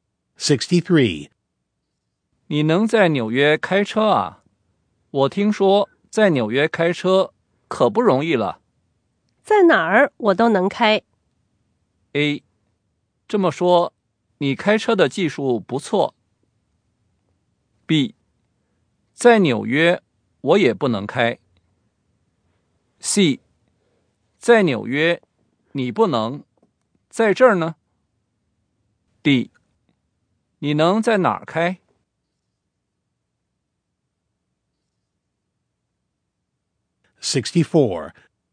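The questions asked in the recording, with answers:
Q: 在哪儿我都能开。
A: A: 这么说,你开车的技术不错。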